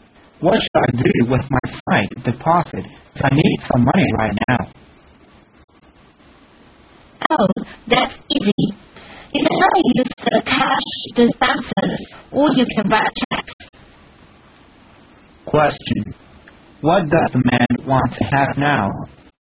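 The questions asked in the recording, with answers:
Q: What does the man want to have now?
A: Some money (cash)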